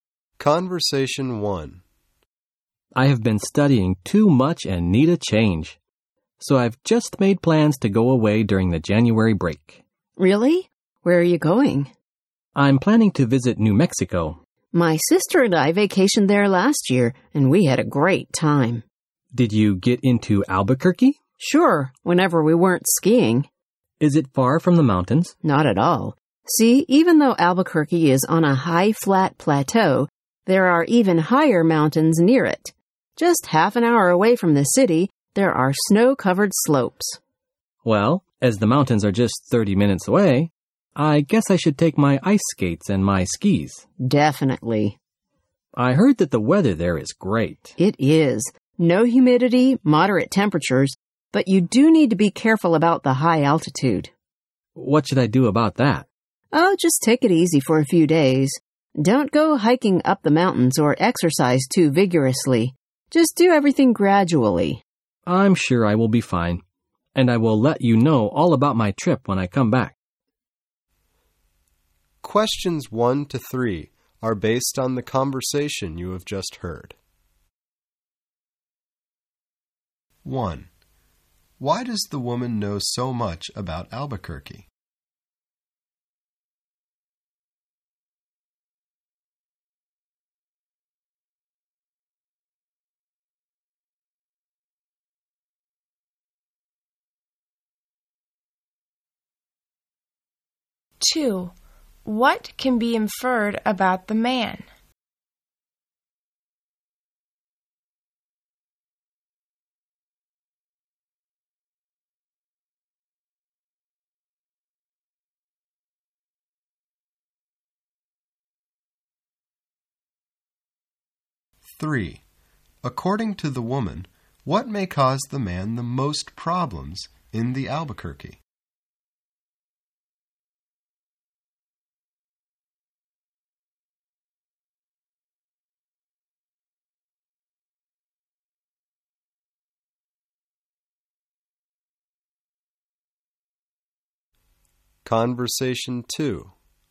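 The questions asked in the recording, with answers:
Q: Why does the woman know so much about Albuquerque?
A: She vacationed there with her sister last year

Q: According to the woman, what may cause the man the most problems in the Albuquerque?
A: The high altitude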